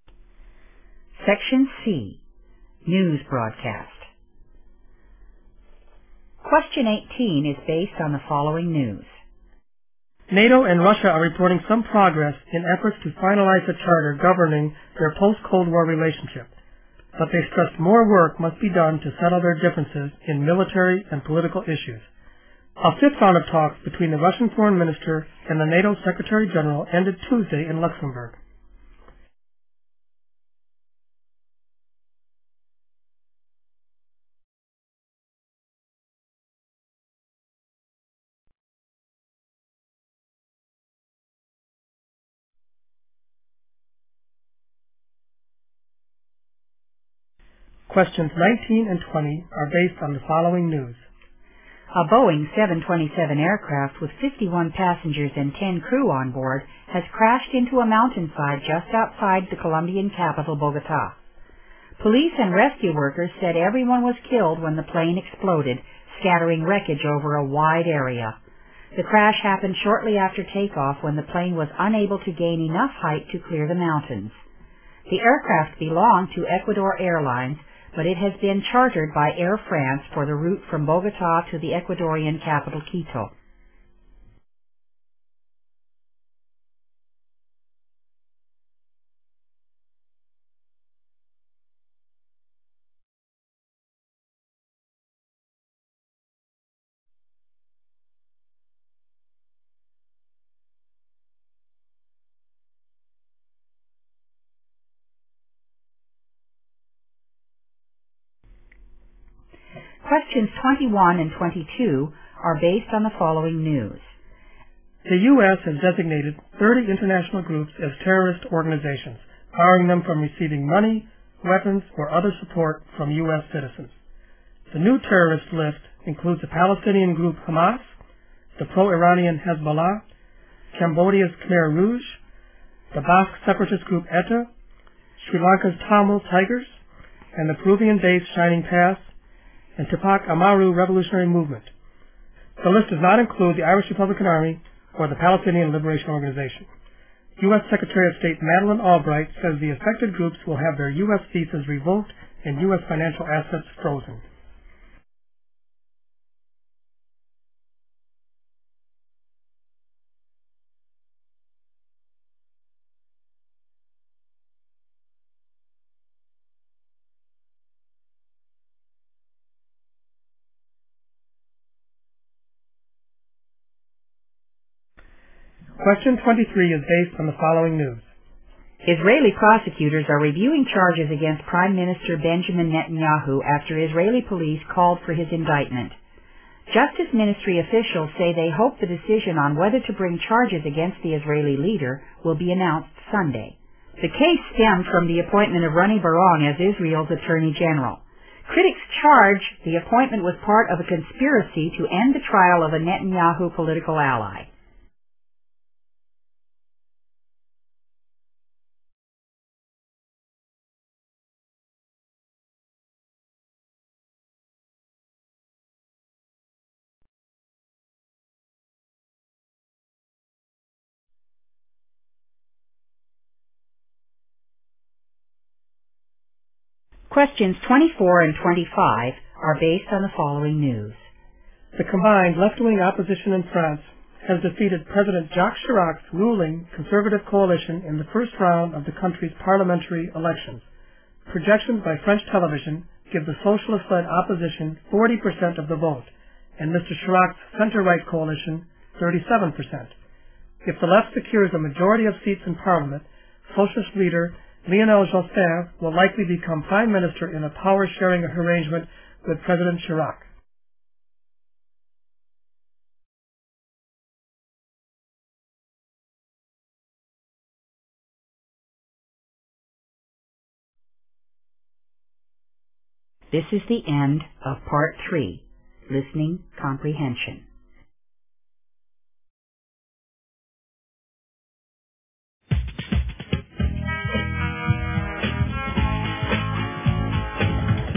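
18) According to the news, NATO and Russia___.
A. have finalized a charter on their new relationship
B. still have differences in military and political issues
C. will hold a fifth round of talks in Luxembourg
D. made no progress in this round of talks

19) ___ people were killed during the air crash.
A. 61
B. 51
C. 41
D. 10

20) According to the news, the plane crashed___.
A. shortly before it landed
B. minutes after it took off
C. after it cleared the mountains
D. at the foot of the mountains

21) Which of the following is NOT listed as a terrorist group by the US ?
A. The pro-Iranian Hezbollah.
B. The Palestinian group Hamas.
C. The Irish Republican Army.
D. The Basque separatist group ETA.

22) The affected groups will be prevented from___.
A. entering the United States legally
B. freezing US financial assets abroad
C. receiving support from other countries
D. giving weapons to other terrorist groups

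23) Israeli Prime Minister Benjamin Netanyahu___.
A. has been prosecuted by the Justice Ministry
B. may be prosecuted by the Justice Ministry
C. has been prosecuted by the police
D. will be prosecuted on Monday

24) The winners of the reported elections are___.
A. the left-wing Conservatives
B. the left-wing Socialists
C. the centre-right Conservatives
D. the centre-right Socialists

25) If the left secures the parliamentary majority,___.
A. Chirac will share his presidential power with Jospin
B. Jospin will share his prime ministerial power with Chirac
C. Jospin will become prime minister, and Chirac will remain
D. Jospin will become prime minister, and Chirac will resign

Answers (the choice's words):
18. still have differences in military and political issues
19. 61
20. minutes after it took off
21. The Irish Republican Army.
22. entering the United States legally
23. may be prosecuted by the Justice Ministry
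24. the left-wing Socialists
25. Jospin will become prime minister, and Chirac will remain

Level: 英语专业四级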